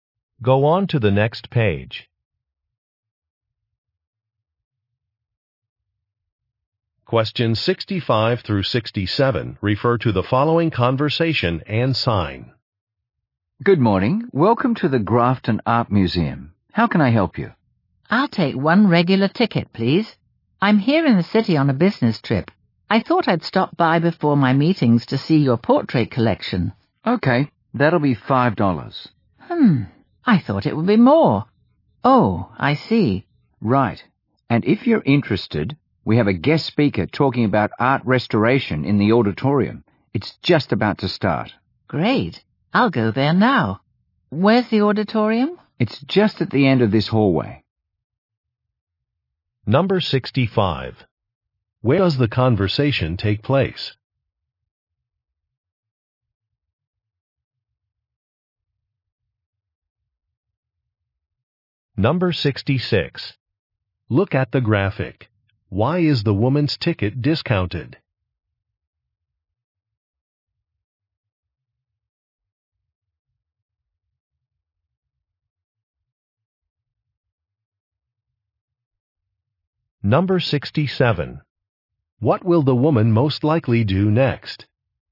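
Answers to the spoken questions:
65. At an art museum
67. Go to a talk on art restoration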